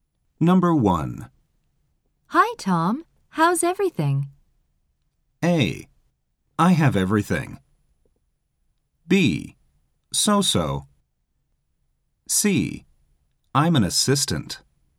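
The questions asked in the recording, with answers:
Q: Hi, Tom. How's everything?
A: B: So-so.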